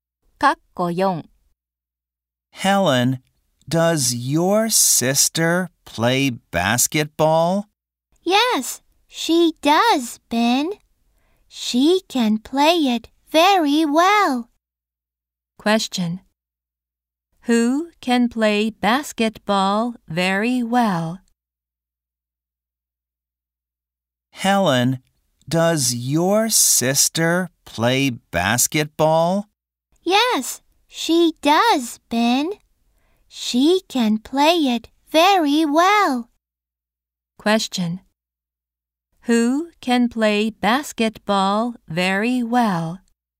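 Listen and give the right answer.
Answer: Helen's sister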